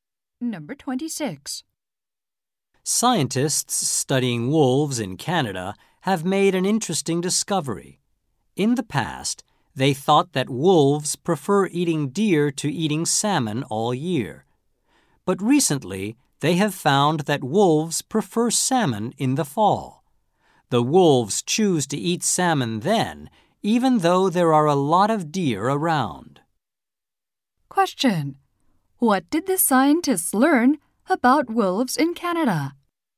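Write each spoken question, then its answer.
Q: Question. What did the scientists learn about wolves in Canada?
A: They prefer salmon in the fall.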